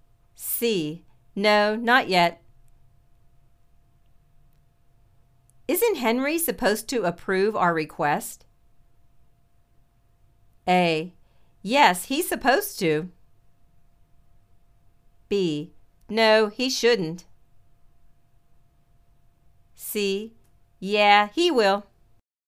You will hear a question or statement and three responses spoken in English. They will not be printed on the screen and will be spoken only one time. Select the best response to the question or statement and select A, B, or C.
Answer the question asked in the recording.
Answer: Yes, he's supposed to.